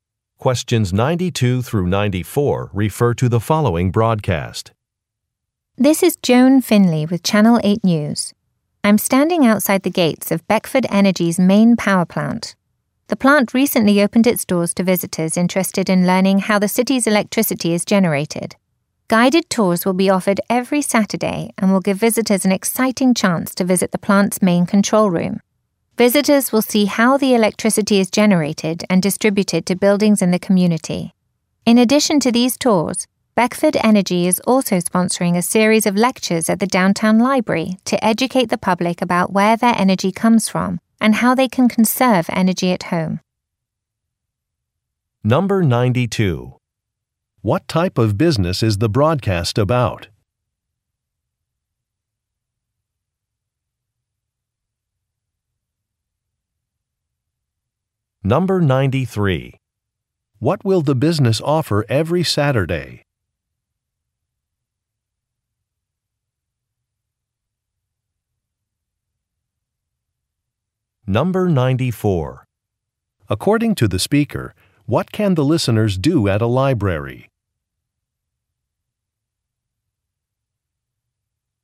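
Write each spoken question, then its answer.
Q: What type of business is the broadcast about?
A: A power plant

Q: What will the business offer every Saturday?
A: Guided tours

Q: According to the speaker, what can the listeners do at a library?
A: Attend lectures about energy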